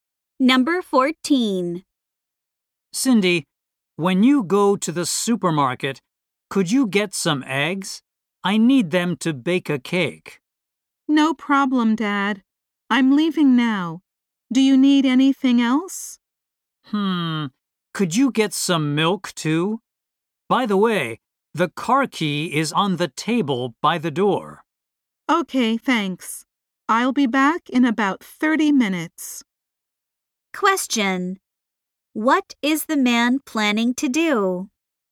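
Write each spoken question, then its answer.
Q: What is the man planning to do?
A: Bake a cake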